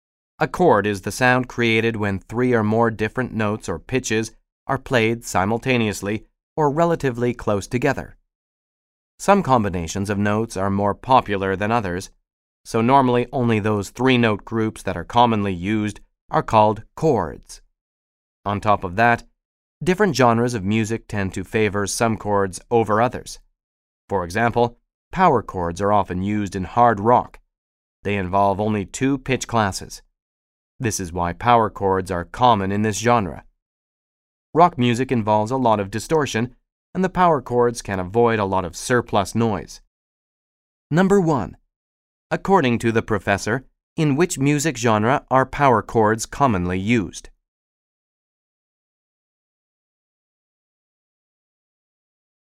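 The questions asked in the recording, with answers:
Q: According to the professor, in which music genre are power chords commonly used?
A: Hard rock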